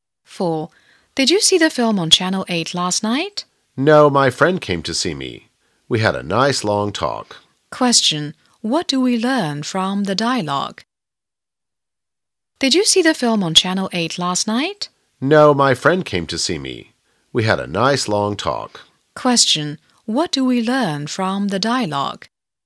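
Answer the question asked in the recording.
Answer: The speaker didn't see the film because a friend came to visit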